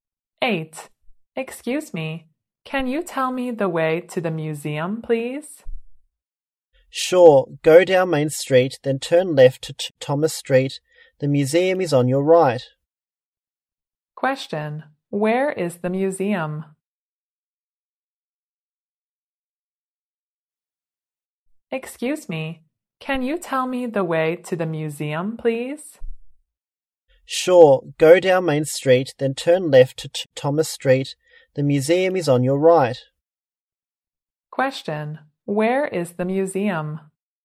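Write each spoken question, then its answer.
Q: Question, where is the museum?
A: On Thomas Street, on the right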